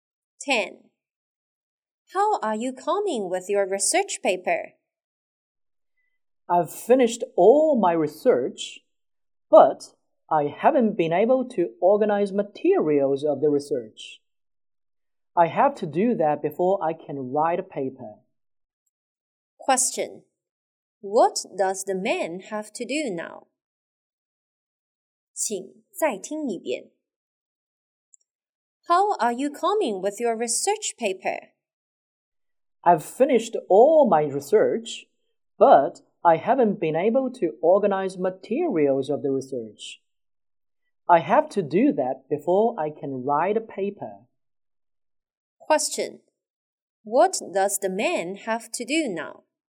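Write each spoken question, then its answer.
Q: What does the man have to do now?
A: Organize the materials of his research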